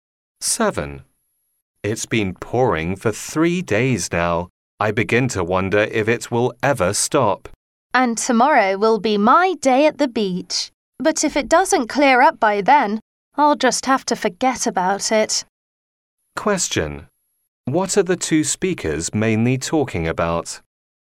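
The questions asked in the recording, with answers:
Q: What are the two speakers mainly talking about?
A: The weather (the rain)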